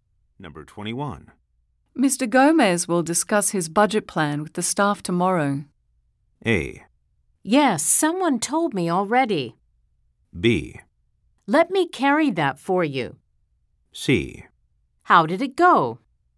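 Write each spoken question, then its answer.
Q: Mr. Gomez will discuss his budget plan with the staff tomorrow.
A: A: Yes, someone told me already.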